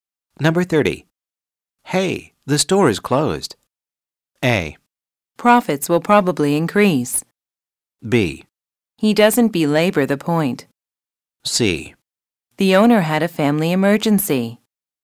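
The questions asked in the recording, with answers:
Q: Hey, the store is closed.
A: C: The owner had a family emergency.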